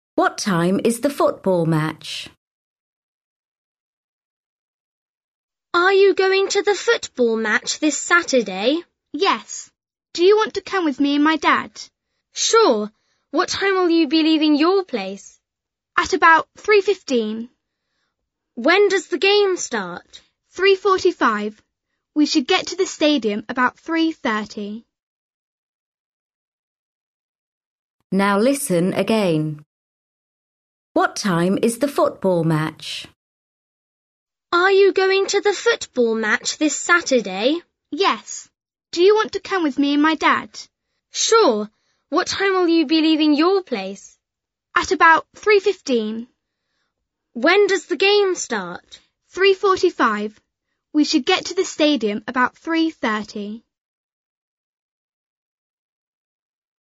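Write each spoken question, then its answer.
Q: What time is the football match?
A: 3:45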